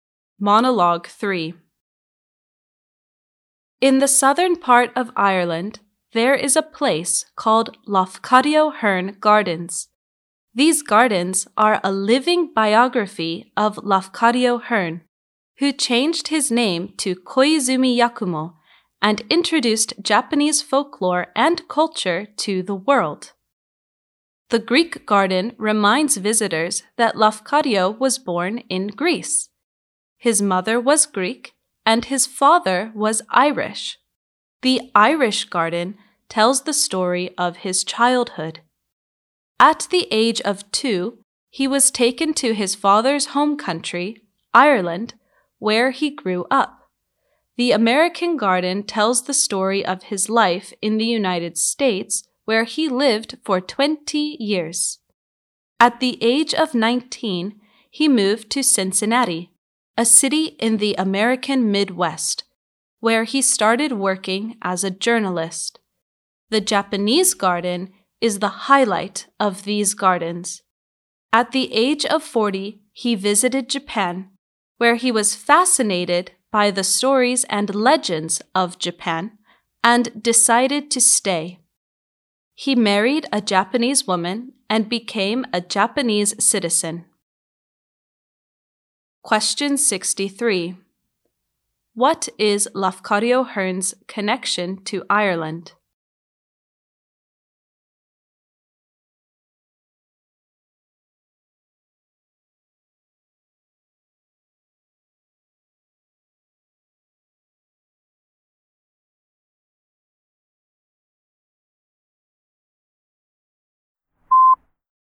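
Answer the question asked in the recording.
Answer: His father was Irish and he grew up in Ireland from age 2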